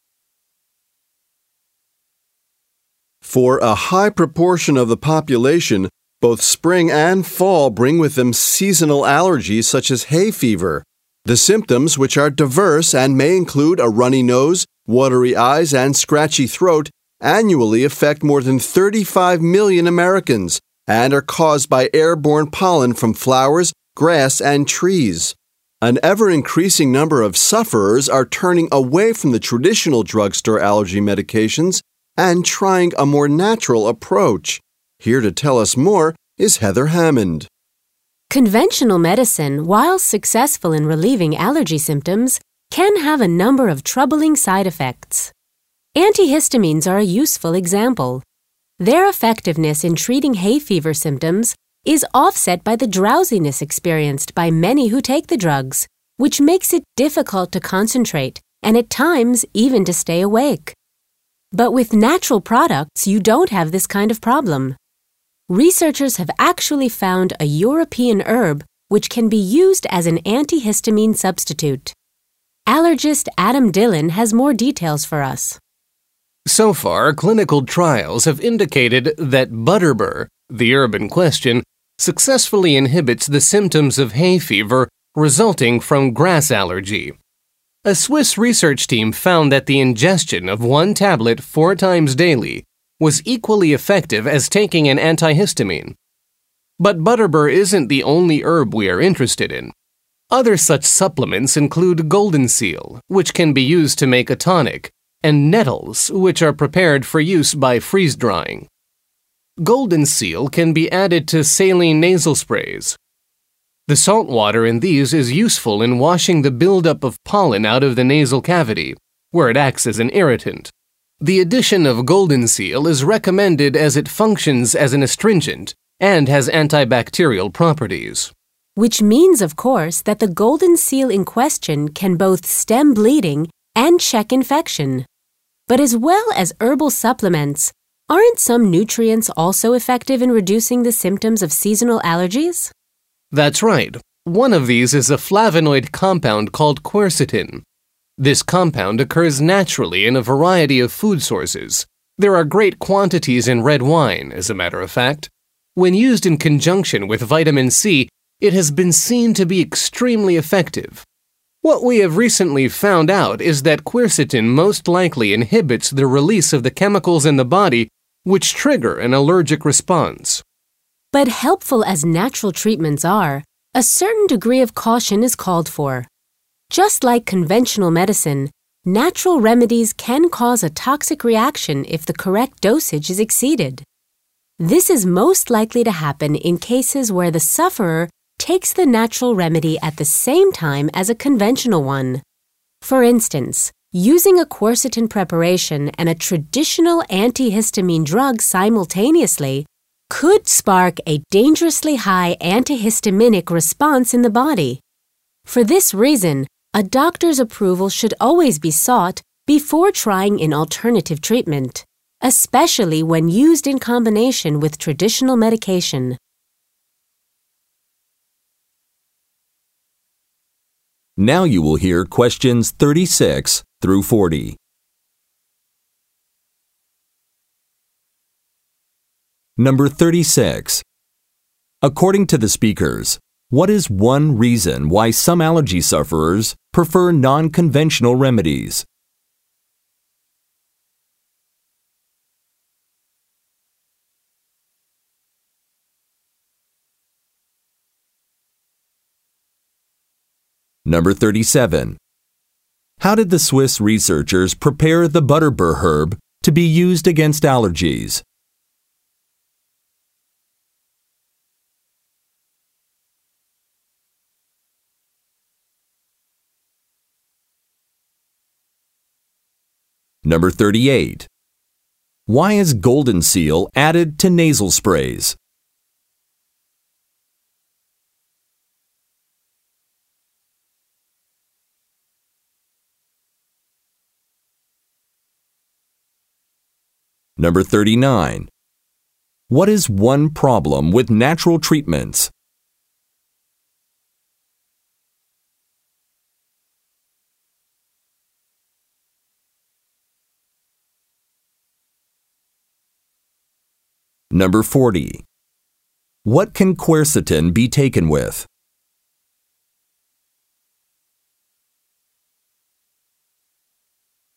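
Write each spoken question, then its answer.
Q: According to the speakers, what is one reason why some allergy sufferers prefer non-conventional remedies?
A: Conventional medicines have side effects such as drowsiness

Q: Why is golden seal added to nasal sprays?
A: It is an astringent and has antibacterial properties

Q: What is one problem with natural treatments?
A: They can cause a toxic reaction if the correct dose is exceeded, especially when taken with conventional medicine

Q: What can quercetin be taken with?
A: Vitamin C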